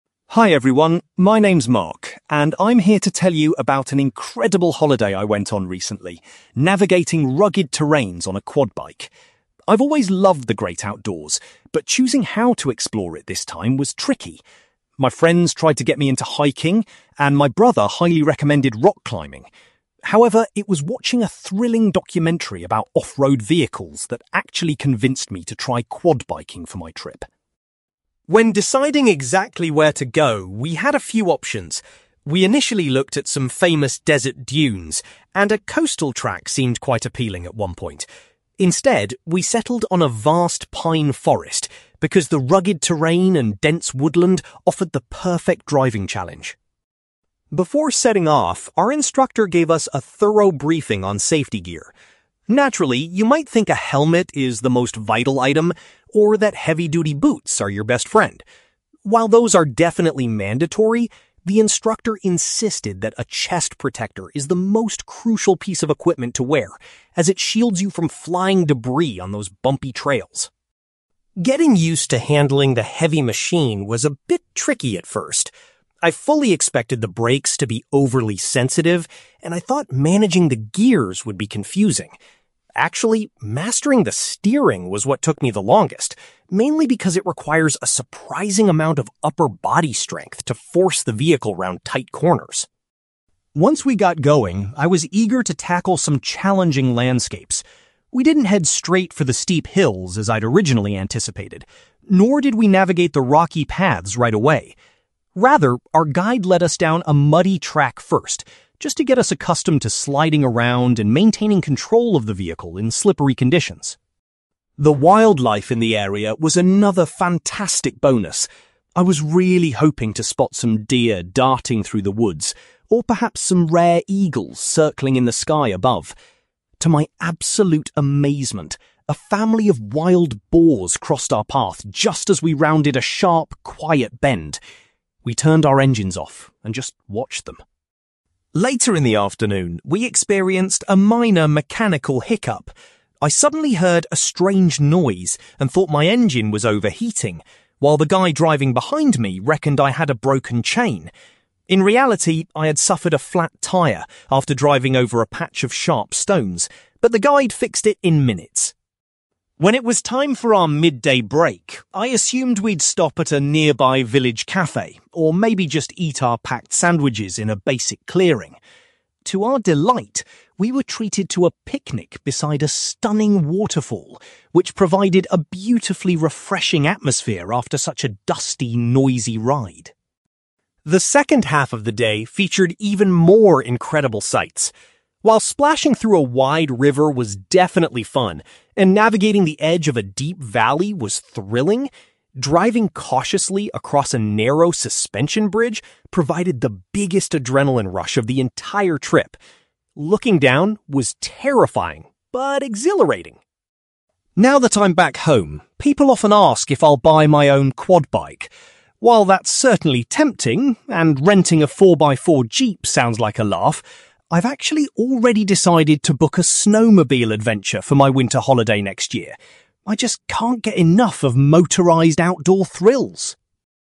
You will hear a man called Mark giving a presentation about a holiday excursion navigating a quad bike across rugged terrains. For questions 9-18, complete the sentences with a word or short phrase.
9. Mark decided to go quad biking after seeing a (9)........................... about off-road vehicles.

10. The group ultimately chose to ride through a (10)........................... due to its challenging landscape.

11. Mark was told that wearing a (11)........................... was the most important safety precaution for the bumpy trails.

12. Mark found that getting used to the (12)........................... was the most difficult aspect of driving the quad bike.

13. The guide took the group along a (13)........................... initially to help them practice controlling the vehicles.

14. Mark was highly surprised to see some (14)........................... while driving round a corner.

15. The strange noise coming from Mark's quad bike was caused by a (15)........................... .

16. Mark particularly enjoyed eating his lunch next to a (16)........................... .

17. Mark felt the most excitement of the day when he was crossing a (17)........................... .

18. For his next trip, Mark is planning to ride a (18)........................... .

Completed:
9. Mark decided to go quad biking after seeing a documentary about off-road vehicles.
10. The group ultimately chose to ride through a pine forest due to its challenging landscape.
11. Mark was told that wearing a chest protector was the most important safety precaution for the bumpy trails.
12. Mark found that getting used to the steering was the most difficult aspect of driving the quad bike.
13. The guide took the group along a muddy track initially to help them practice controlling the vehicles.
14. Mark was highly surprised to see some wild boars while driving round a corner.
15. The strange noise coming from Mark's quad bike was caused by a flat tyre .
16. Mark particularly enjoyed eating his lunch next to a waterfall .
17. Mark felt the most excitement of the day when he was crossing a suspension bridge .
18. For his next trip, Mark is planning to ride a snowmobile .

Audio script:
Mark: Hi everyone, my name is Mark, and I'm here to tell you about an incredible holiday I went on recently, navigating rugged terrains on a quad bike. I've always loved the great outdoors, but choosing how to explore it this time was tricky. My friends tried to get me into hiking, and my brother highly recommended rock climbing. However, it was watching a thrilling documentary about off-road vehicles that actually convinced me to try quad biking for my trip.
When deciding exactly where to go, we had a few options. We initially looked at some famous desert dunes, and a coastal track seemed quite appealing at one point. Instead, we settled on a vast pine forest because the rugged terrain and dense woodland offered the perfect driving challenge.
Before setting off, our instructor gave us a thorough briefing on safety gear. Naturally, you might think a helmet is the most vital item, or that heavy-duty boots are your best friend. While those are definitely mandatory, the instructor insisted that a chest protector is the most crucial piece of equipment to wear, as it shields you from flying debris on those bumpy trails.
Getting used to handling the heavy machine was a bit tricky at first. I fully expected the brakes to be overly sensitive, and I thought managing the gears would be confusing. Actually, mastering the steering was what took me the longest, mainly because it requires a surprising amount of upper body strength to force the vehicle round tight corners.
Once we got going, I was eager to tackle some challenging landscapes. We didn't head straight for the steep hills as I'd originally anticipated, nor did we navigate the rocky paths right away. Rather, our guide led us down a muddy track first, just to get us accustomed to sliding around and maintaining control of the vehicle in slippery conditions.
The wildlife in the area was another fantastic bonus. I was really hoping to spot some deer darting through the woods, or perhaps some rare eagles circling in the sky above. To my absolute amazement, a family of wild boars crossed our path just as we rounded a sharp, quiet bend. We turned our engines off and just watched them.
Later in the afternoon, we experienced a minor mechanical hiccup. I suddenly heard a strange noise and thought my engine was overheating, while the guy driving behind me reckoned I had a broken chain. In reality, I had suffered a flat tyre after driving over a patch of sharp stones, but the guide fixed it in minutes.
When it was time for our midday break, I assumed we'd stop at a nearby village cafe, or maybe just eat our packed sandwiches in a basic clearing. To our delight, we were treated to a picnic beside a stunning waterfall, which provided a beautifully refreshing atmosphere after such a dusty, noisy ride.
The second half of the day featured even more incredible sights. While splashing through a wide river was definitely fun, and navigating the edge of a deep valley was thrilling, driving cautiously across a narrow suspension bridge provided the biggest adrenaline rush of the entire trip. Looking down was terrifying but exhilarating!
Now that I'm back home, people often ask if I'll buy my own quad bike. While that's certainly tempting, and renting a four-by-four jeep sounds like a laugh, I've actually already decided to book a snowmobile adventure for my winter holiday next year. I just can't get enough of motorized outdoor thrills!

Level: B2